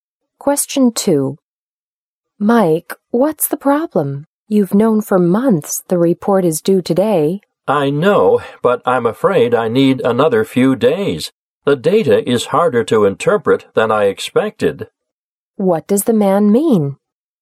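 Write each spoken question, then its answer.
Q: What does the man mean?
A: He needs a few more days to finish the report.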